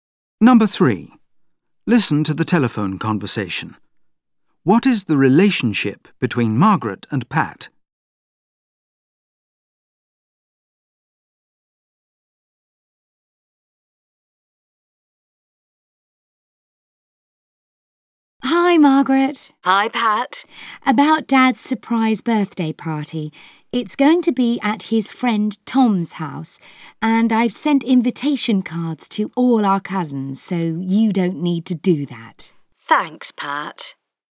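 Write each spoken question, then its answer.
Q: What is the relationship between Margaret and Pat?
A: They are siblings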